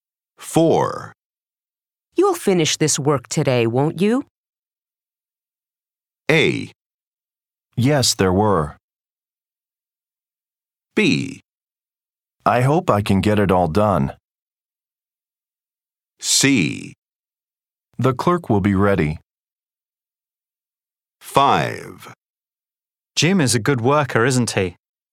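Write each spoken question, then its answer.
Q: You'll finish this work today, won't you?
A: B: I hope I can get it all done.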